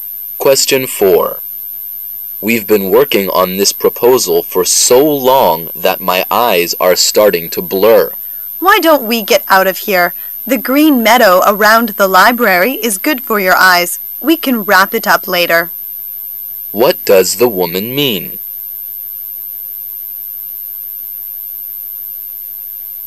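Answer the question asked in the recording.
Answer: They should take a break outside and finish the proposal later.

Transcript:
[解析] M: We've been working on this proposal for so long that my eyes are starting to blur. W: Why don't we get out of here? The green meadow around the library is good for your eyes. We can wrap it up later. Q: What does the woman mean?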